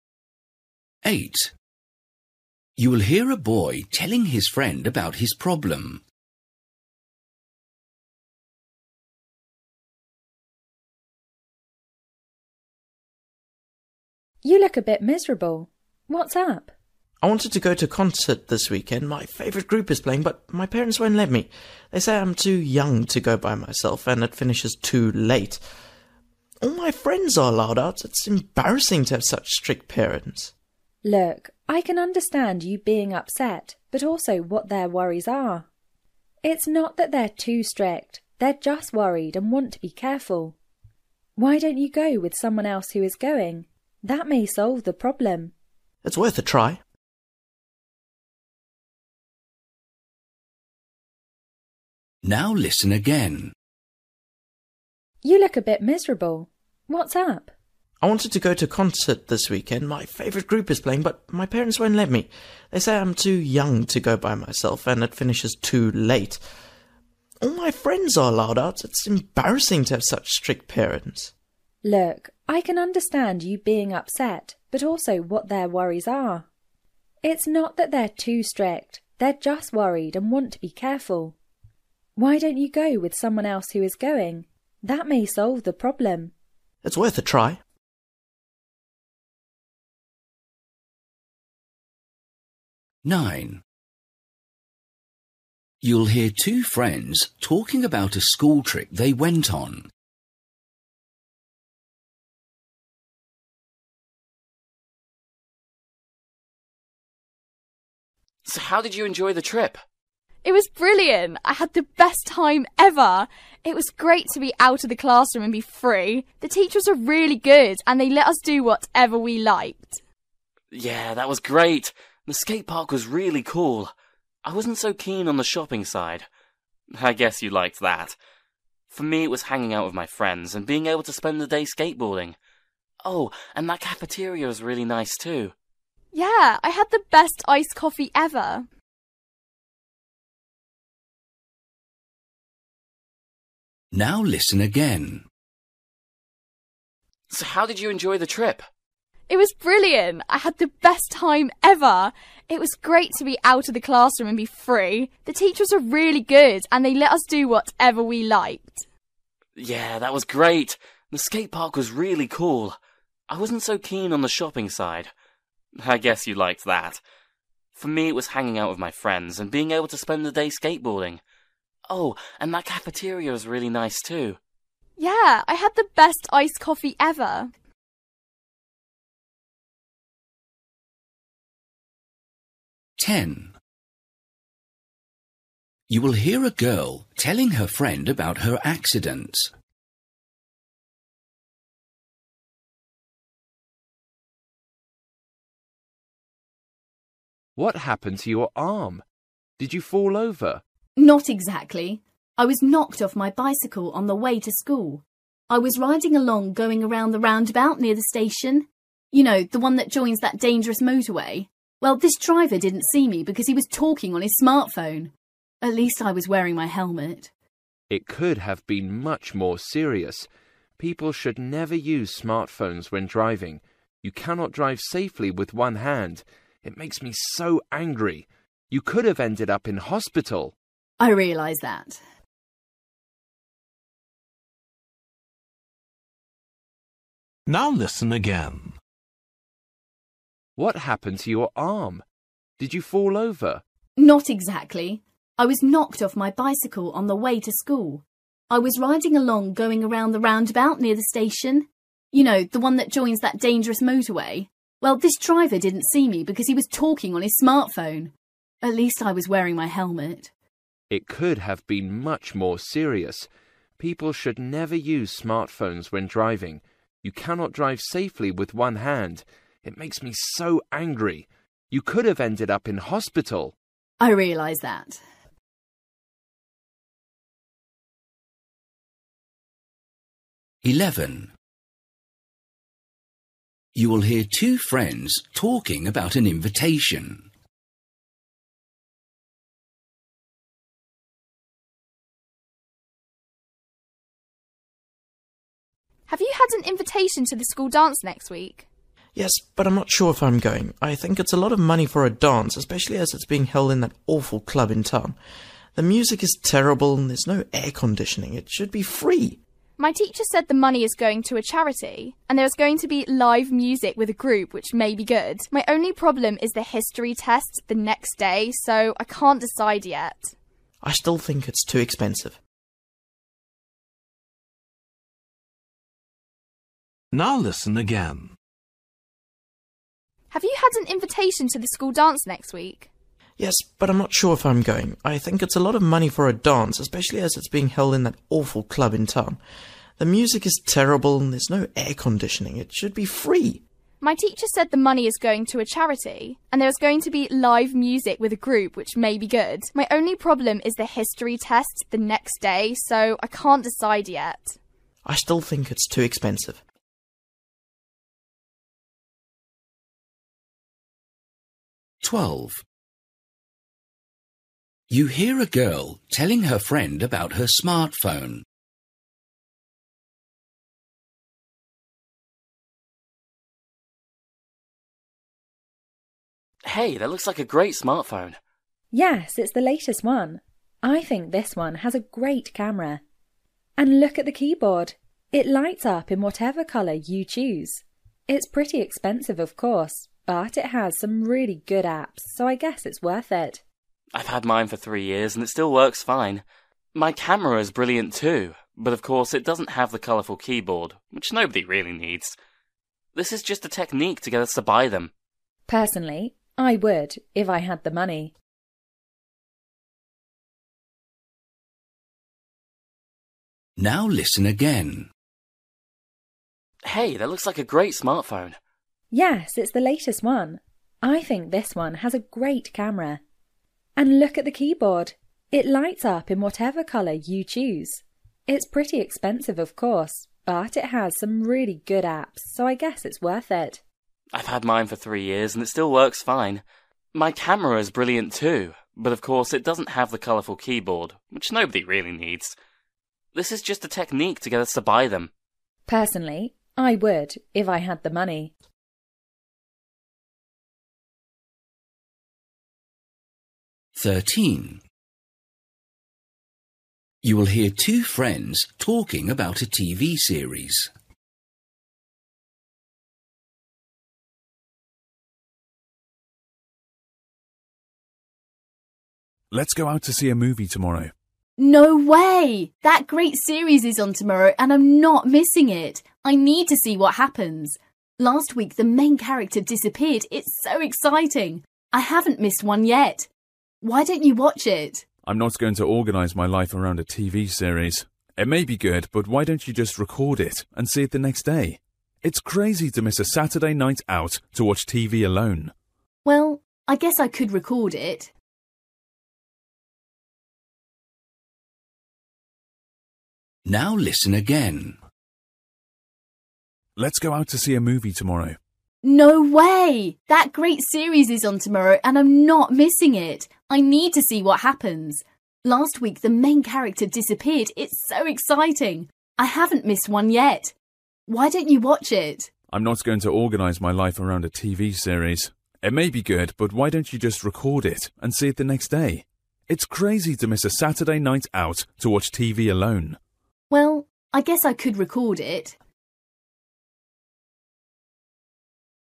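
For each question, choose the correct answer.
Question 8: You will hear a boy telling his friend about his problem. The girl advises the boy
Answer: to go to the concert with someone else who is going

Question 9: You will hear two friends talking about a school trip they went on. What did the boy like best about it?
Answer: hanging out with his friends and skateboarding

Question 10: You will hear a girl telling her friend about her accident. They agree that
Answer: people should never use smartphones when driving

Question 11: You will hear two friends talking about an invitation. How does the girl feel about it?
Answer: undecided, because of the history test the next day

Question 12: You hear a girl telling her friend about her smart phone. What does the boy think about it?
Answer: the colourful keyboard is just a trick to get people to buy it, but he would buy one if he had the money

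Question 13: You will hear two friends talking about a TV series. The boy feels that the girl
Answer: should record it and not miss a Saturday night out

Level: Luyện nghe trình độ B1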